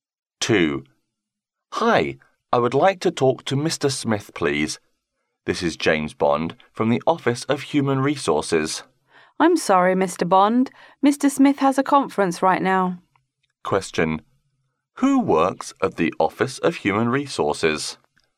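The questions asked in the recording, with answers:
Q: Who works at the Office of Human Resources?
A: James Bond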